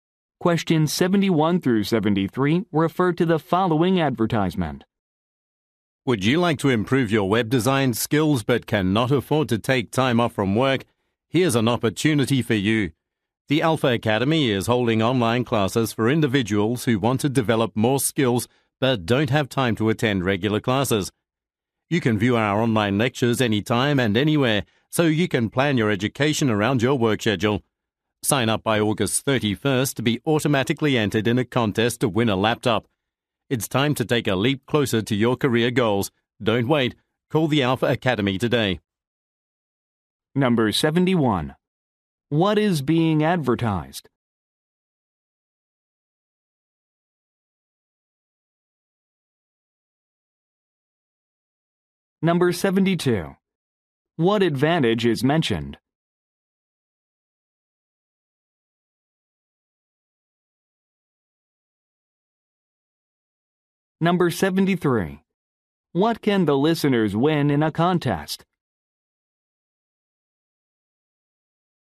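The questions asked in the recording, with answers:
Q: What is being advertised?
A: Online web design classes

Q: What advantage is mentioned?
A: Lectures can be viewed anytime, anywhere, around your work schedule

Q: What can the listeners win in a contest?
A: A laptop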